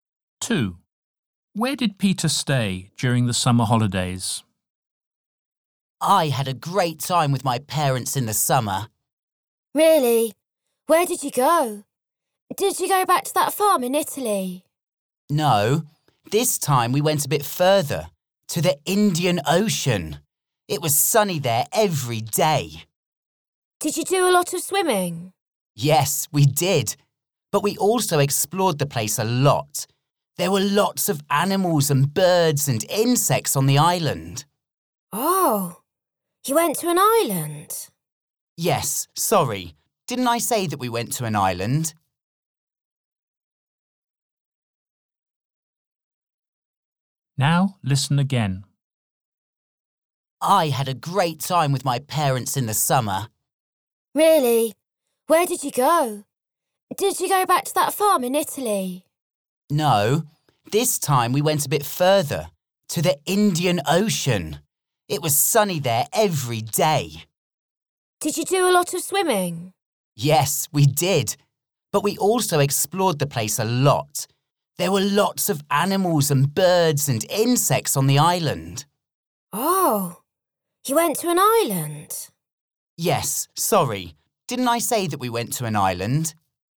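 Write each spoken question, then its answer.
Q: Where did Peter stay during the summer holidays?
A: On an island in the Indian Ocean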